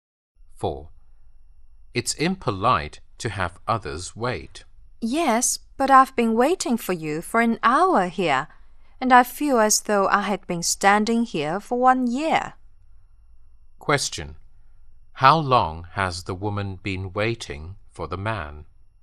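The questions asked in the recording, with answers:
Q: How long has the woman been waiting for the man?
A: An hour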